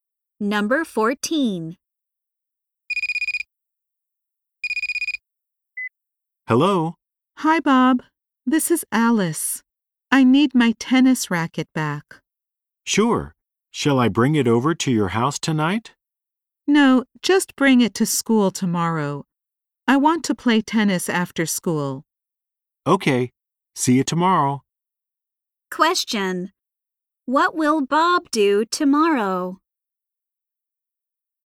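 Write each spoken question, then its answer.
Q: What will Bob do tomorrow?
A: Bring Alice's tennis racket to school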